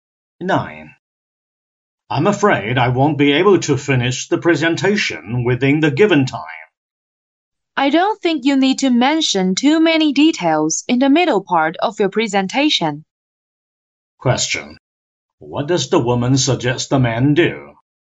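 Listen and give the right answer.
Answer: Cut down the details in the middle part of his presentation.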